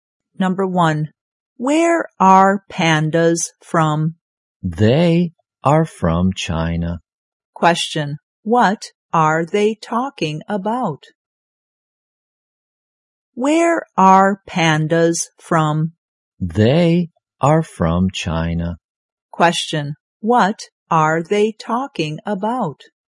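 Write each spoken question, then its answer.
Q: what are they talking about?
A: Pandas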